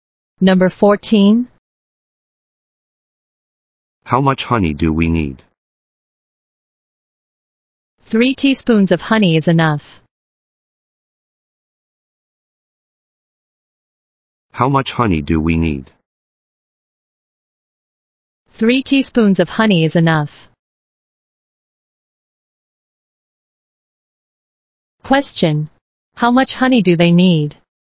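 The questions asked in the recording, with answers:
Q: How much honey do they need?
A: 3 teaspoons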